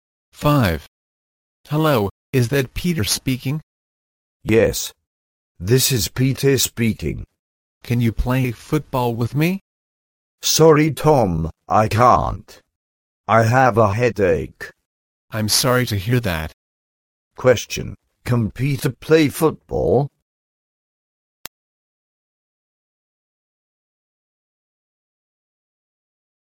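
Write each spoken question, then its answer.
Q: Question, can Peter play football?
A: No, he can't.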